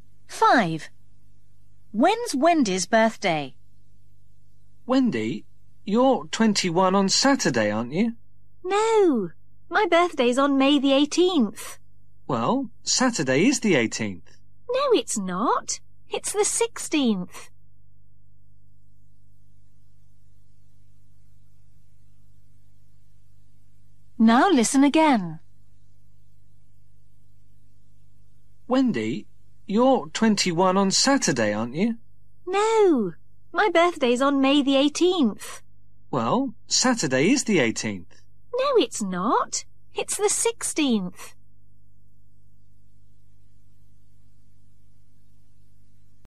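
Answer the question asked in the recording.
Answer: May the 18th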